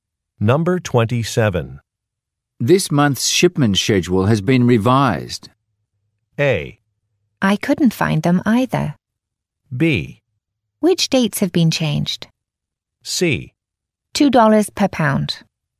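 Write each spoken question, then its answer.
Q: This month's shipment schedule has been revised.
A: B: Which dates have been changed?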